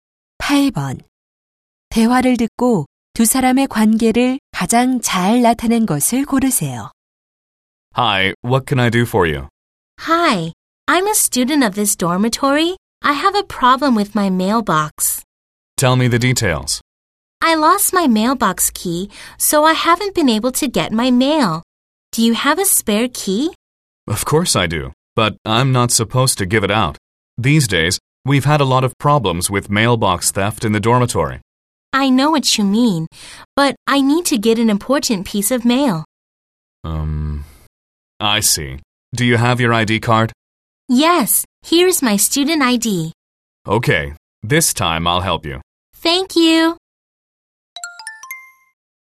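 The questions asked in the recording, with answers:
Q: 대화를 듣고 두 사람의 관계를 가장 잘 나타낸 것을 고르세요.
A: 기숙사 직원 - 학생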